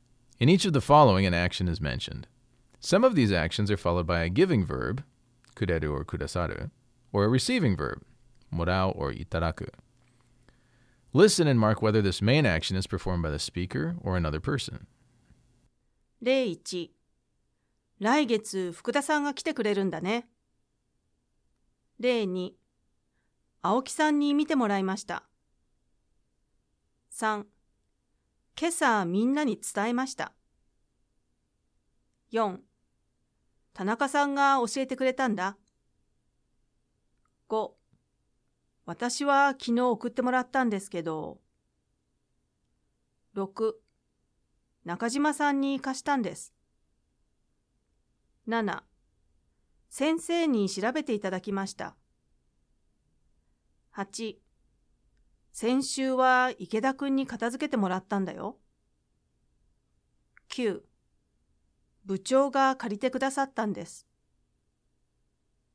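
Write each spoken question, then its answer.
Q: 今朝みんなに伝えました。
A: 話し手

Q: 田中さんが教えてくれたんだ。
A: 他の人(田中さん)

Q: 私は昨日送ってもらったんですけど。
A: 他の人

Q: 中島さんに貸したんです。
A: 話し手

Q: 先生に調べていただきました。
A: 他の人(先生)

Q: 先週は池田くんに片付けてもらったんだよ。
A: 他の人(池田くん)

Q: 部長が借りてくださったんです。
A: 他の人(部長)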